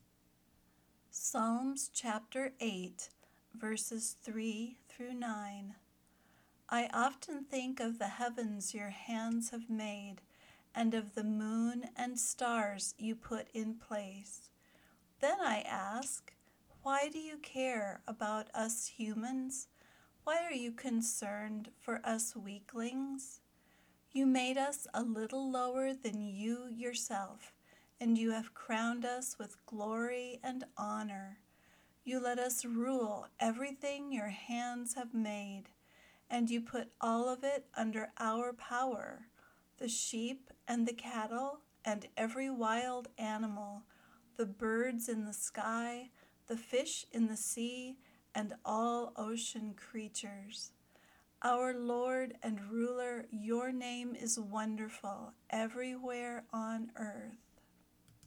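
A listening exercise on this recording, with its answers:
Find the answers to these three questions as you listen:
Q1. What does King David ask?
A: Why do you care about us humans?

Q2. What are people crowned with?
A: Glory and honor

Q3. What does God let us rule?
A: Everything his hands have made

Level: Beginner Lesson 10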